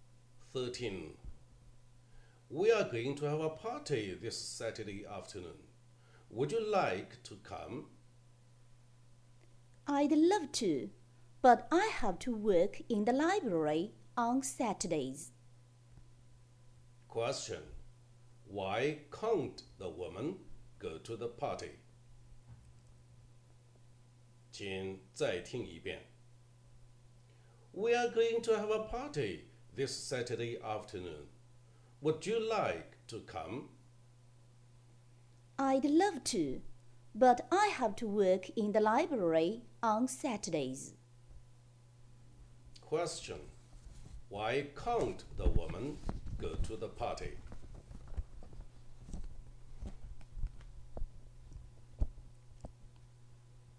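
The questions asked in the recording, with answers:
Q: Why can't the woman go to the party?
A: She has to work in the library on Saturdays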